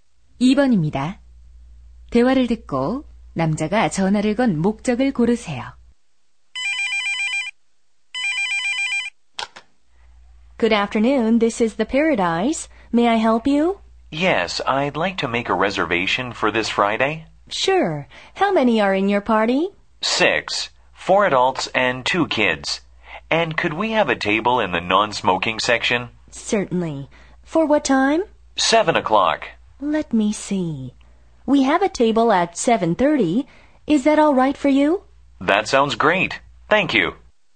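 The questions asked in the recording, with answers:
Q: 대화를 듣고 남자가 전화를 건 목적을 고르세요.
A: 식당 예약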